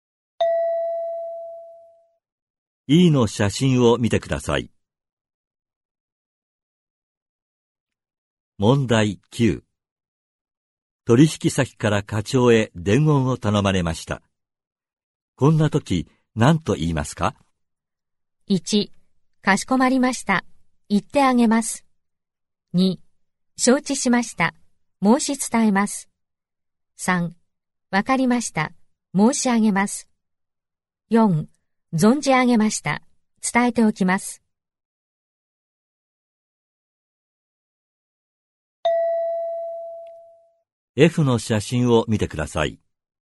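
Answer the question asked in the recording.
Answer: 2: 承知しました。申し伝えます。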